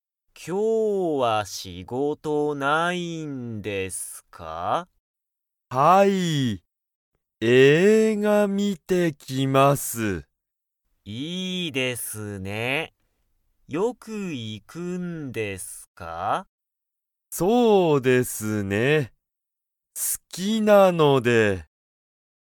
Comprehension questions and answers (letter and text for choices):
山川(やまかわ)さんは、よく映画(えいが)に行(い)きますか?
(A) はい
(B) いいえ)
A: (A) はい

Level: Level 1